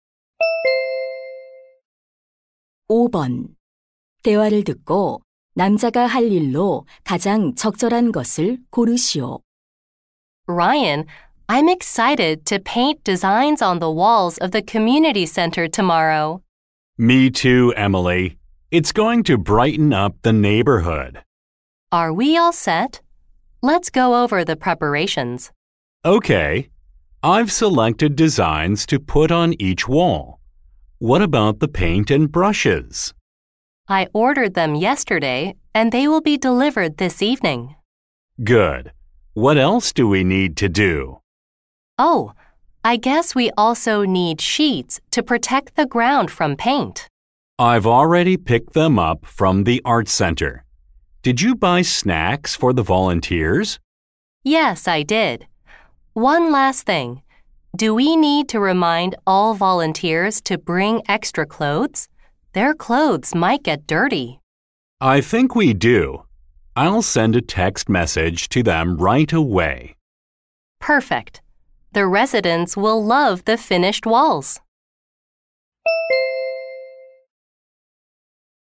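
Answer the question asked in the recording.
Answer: 자원봉사자들에게 여벌 옷을 가져오라고 문자 보내기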